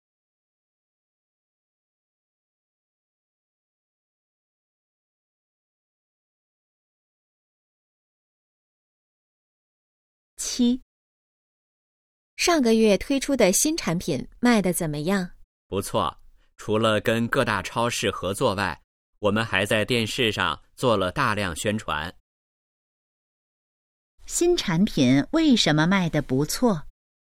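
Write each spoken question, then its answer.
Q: 新产品为什么卖得不错?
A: 跟超市合作,还在电视上做了大量宣传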